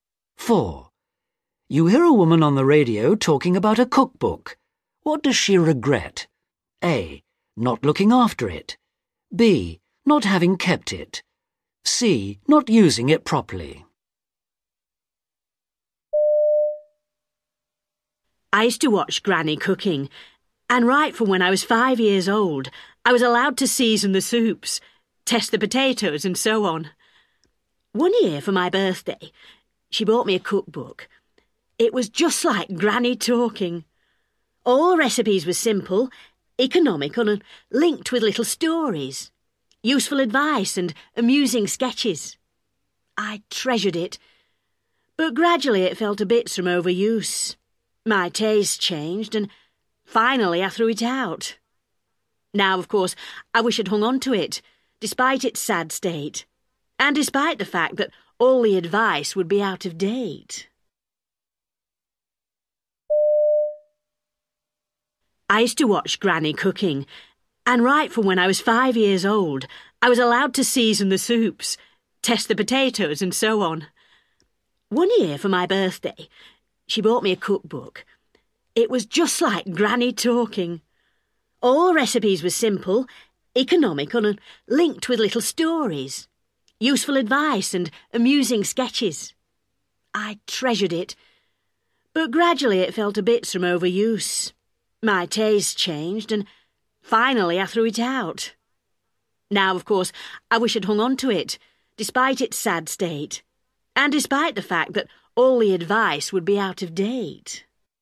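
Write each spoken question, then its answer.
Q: What does she regret?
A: B: Not having kept it.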